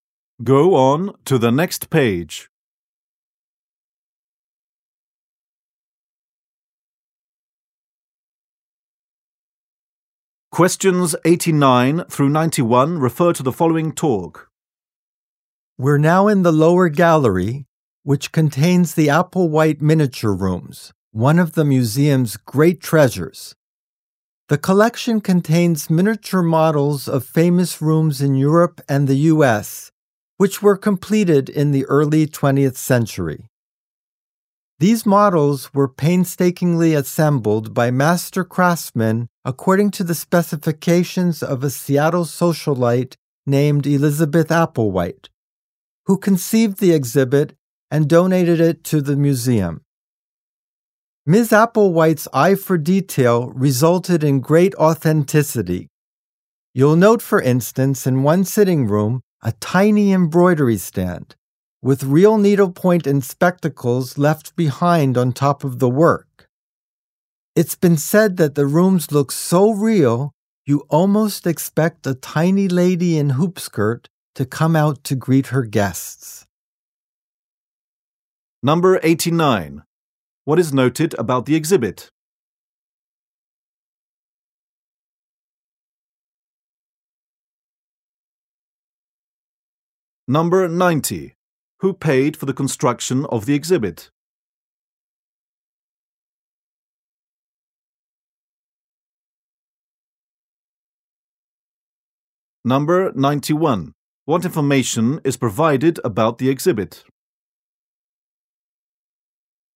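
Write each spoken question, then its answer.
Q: Who paid for the construction of the exhibit?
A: Elizabeth Applewhite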